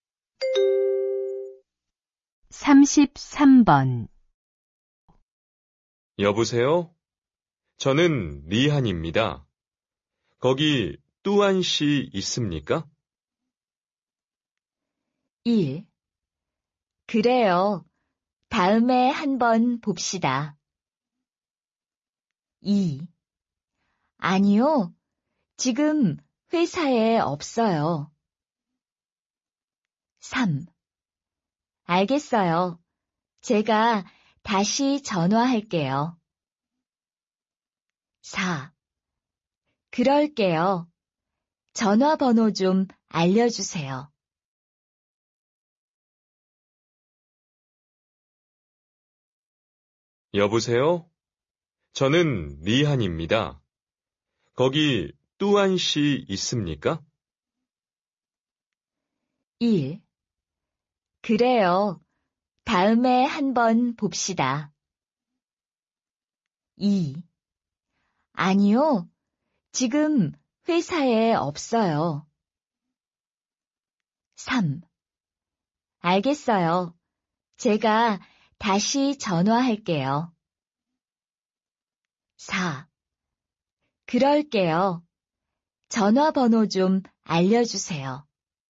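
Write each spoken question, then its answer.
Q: 여보세요? 저는 리한입니다. 거기 뚜안 씨 있습니까?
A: 2: 아니요. 지금 회사에 없어요.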